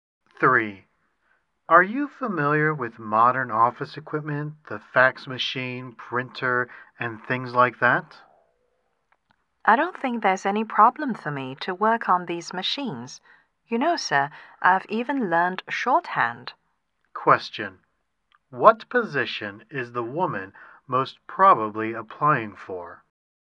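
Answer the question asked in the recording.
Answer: A secretary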